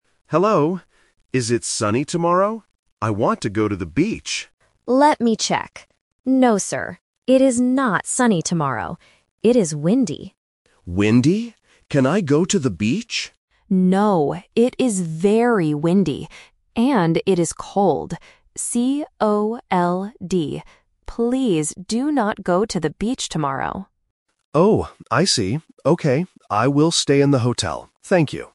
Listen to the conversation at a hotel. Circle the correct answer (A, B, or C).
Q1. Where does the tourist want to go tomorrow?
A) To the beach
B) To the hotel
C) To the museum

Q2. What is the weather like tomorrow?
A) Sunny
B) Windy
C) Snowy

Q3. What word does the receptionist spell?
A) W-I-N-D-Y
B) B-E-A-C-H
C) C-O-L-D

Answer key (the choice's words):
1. To the beach
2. Windy
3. C-O-L-D

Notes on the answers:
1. The tourist says clearly at the beginning, "I want to go to the beach." The Trap: Option (B) "To the hotel" is mentioned at the end ("I will stay in the hotel"), but that is his new plan, not where he wants to go originally. Not Mentioned: Option (C) "To the museum" is completely new information.
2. The receptionist answers, "It is windy," and repeats it: "It is very windy." The Trap: Option (A) "Sunny" is mentioned when the tourist asks "Is it sunny tomorrow?", but the receptionist says "No". Not Mentioned: Option (C) "Snowy" is never mentioned in the audio.
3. The receptionist says, "And it is cold," then spells the word: "C-O-L-D." The Trap: Option (A) "W-I-N-D-Y" and Option (B) "B-E-A-C-H" are important words in the conversation, but the receptionist does not spell them.